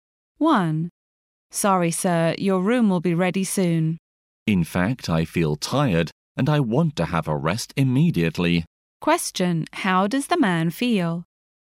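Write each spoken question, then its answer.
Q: How does the man feel?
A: Tired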